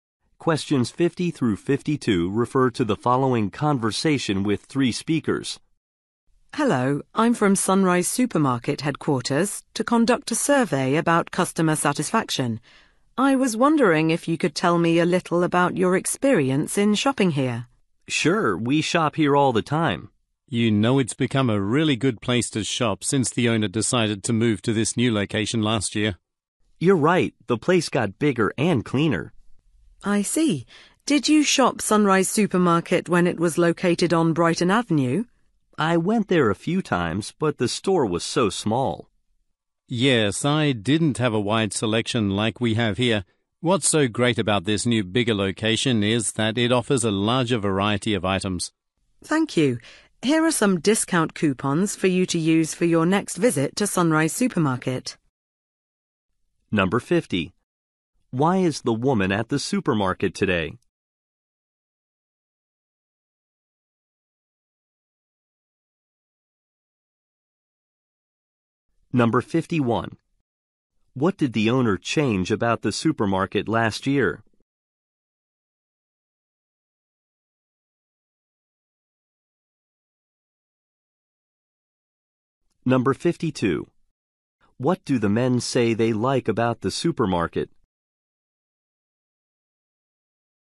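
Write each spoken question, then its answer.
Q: Why is the woman at the supermarket today?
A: To conduct a customer satisfaction survey

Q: What did the owner change about the supermarket last year?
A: Its location

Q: What do the men say they like about the supermarket?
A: Larger variety of items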